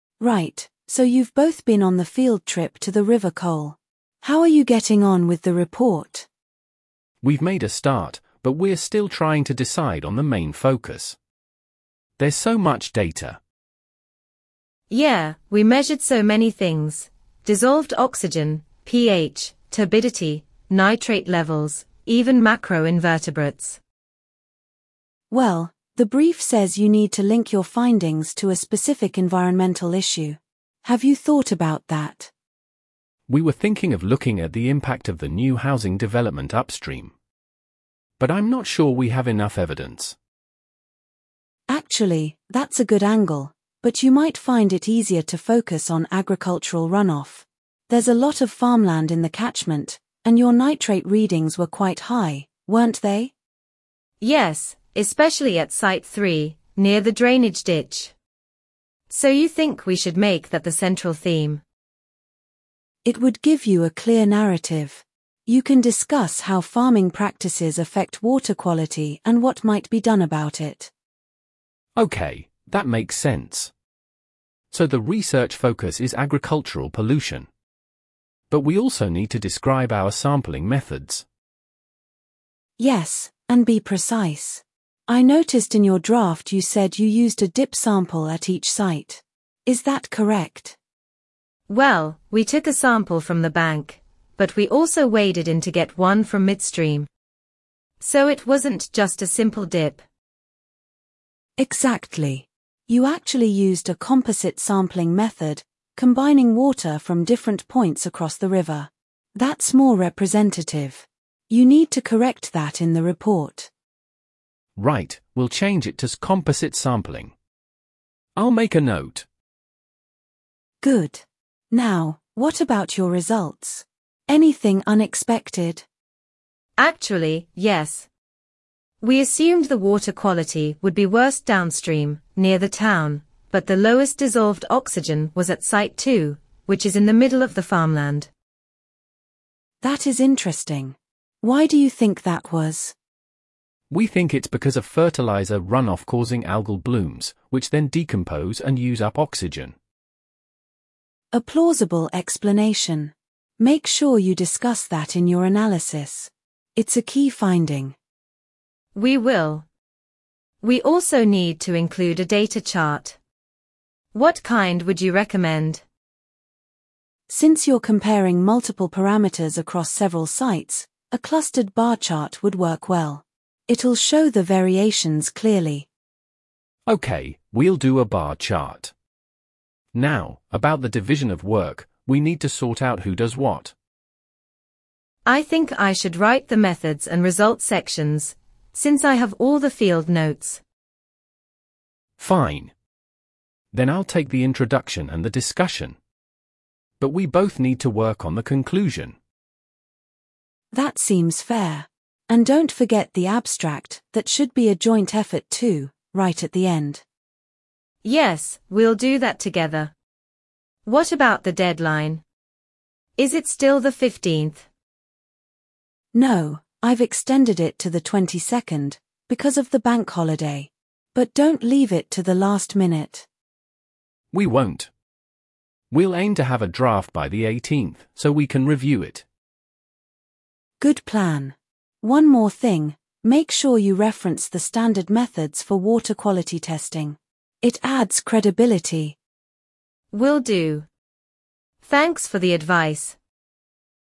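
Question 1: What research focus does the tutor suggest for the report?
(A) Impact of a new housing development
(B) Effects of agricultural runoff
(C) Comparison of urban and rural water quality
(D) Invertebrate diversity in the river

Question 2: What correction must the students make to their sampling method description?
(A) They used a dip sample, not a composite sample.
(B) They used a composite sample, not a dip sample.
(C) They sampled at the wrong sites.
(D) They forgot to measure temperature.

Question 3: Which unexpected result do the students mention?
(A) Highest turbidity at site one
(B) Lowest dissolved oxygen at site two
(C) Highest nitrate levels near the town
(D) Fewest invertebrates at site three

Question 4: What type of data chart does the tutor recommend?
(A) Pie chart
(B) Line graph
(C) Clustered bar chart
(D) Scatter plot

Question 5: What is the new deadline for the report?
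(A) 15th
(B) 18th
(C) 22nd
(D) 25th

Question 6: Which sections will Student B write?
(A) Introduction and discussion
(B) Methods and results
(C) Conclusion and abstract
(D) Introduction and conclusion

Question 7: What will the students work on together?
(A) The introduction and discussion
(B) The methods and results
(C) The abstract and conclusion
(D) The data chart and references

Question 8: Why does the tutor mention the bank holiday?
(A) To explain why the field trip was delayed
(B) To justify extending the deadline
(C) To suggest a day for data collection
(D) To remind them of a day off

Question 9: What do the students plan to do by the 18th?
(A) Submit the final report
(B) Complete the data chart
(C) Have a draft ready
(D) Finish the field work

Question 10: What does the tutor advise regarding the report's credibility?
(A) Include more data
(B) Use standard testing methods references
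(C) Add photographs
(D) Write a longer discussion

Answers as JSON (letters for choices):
{"1": "B", "2": "B", "3": "B", "4": "C", "5": "C", "6": "B", "7": "C", "8": "B", "9": "C", "10": "B"}

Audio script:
Tutor: Right, so you've both been on the field trip to the River Cole. How are you getting on with the report?
Student A: We've made a start, but we're still trying to decide on the main focus. There's so much data.
Student B: Yeah, we measured so many things: dissolved oxygen, pH, turbidity, nitrate levels, even macroinvertebrates.
Tutor: Well, the brief says you need to link your findings to a specific environmental issue. Have you thought about that?
Student A: We were thinking of looking at the impact of the new housing development upstream. But I'm not sure we have enough evidence.
Tutor: Actually, that's a good angle, but you might find it easier to focus on agricultural runoff. 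There's a lot of farmland in the catchment, and your nitrate readings were quite high, weren't they?
Student B: Yes, especially at site three, near the drainage ditch. So you think we should make that the central theme?
Tutor: It would give you a clear narrative. You can discuss how farming practices affect water quality and what might be done about it.
Student A: OK, that makes sense. So the research focus is agricultural pollution. But we also need to describe our sampling methods.
Tutor: Yes, and be precise. I noticed in your draft you said you used a 'dip sample' at each site. Is that correct?
Student B: Well, we took a sample from the bank, but we also waded in to get one from midstream. So it wasn't just a simple dip.
Tutor: Exactly. You actually used a composite sampling method, combining water from different points across the river. That's more representative. You need to correct that in the report.
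Student A: Right, we'll change it to 'composite sampling'. I'll make a note.
Tutor: Good. Now, what about your results? Anything unexpected?
Student B: Actually, yes. We assumed the water quality would be worst downstream, near the town, but the lowest dissolved oxygen was at site two, which is in the middle of the farmland.
Tutor: That is interesting. Why do you think that was?
Student A: We think it's because of fertiliser runoff causing algal blooms, which then decompose and use up oxygen.
Tutor: A plausible explanation. Make sure you discuss that in your analysis. It's a key finding.
Student B: We will. We also need to include a data chart. What kind would you recommend?
Tutor: Since you're comparing multiple parameters across several sites, a clustered bar chart would work well. It'll show the variations clearly.
Student A: OK, we'll do a bar chart. Now, about the division of work... 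we need to sort out who does what.
Student B: I think I should write the methods and results sections, since I have all the field notes.
Student A: Fine. Then I'll take the introduction and the discussion. But we both need to work on the conclusion.
Tutor: That seems fair. And don't forget the abstract - that should be a joint effort too, right at the end.
Student B: Yes, we'll do that together. What about the deadline? Is it still the 15th?
Tutor: No, I've extended it to the 22nd, because of the bank holiday. But don't leave it to the last minute.
Student A: We won't. We'll aim to have a draft by the 18th, so we can review it.
Tutor: Good plan. One more thing: make sure you reference the standard methods for water quality testing. It adds credibility.
Student B: Will do. Thanks for the advice.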